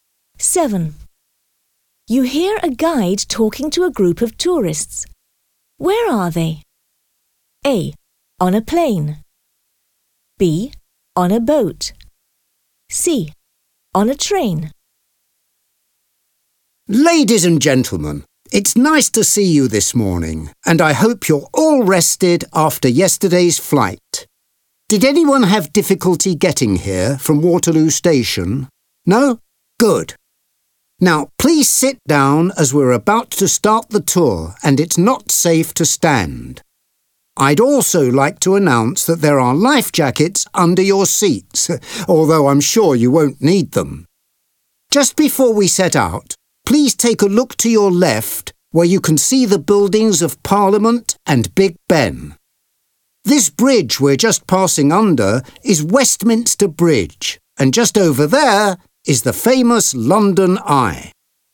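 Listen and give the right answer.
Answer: B: On a boat.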